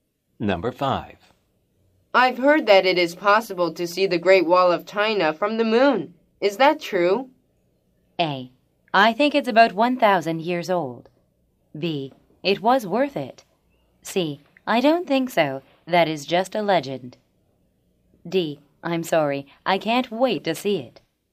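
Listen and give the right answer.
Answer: C: I don't think so. That is just a legend.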